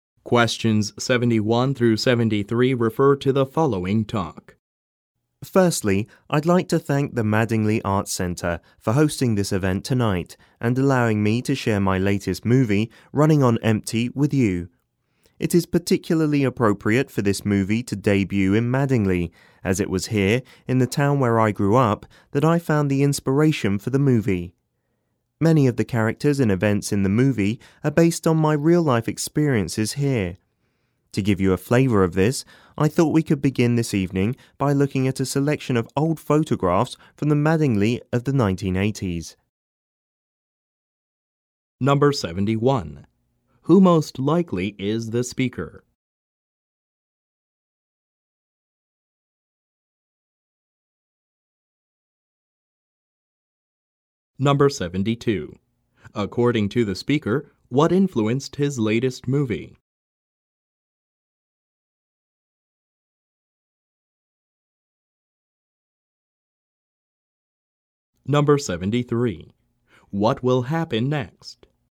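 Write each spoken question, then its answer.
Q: Who most likely is the speaker?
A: A movie director (filmmaker)

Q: According to the speaker, what influenced his latest movie?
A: His real-life experiences growing up in Mattingly

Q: What will happen next?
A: They will look at old photographs of Mattingly from the 1980s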